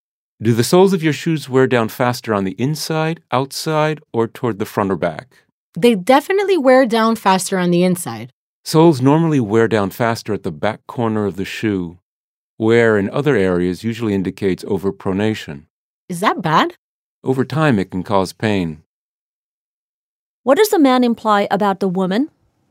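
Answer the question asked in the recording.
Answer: She probably overpronates, which could cause her pain over time.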